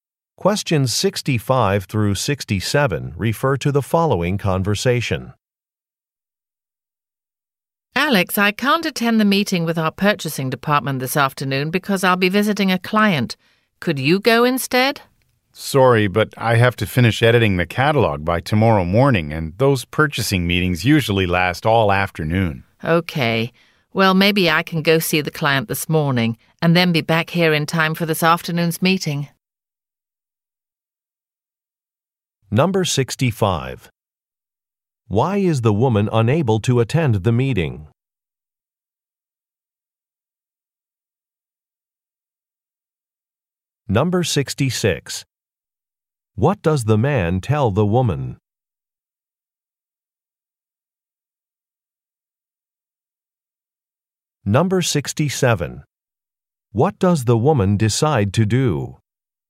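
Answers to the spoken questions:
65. She will be visiting a client
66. He has to finish editing the catalog by tomorrow morning
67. See the client this morning and come back for the afternoon meeting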